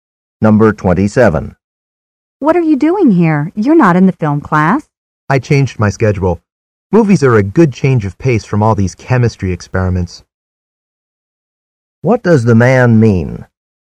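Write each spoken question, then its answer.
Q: What does the man mean?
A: He enrolled in the film class as a break from chemistry.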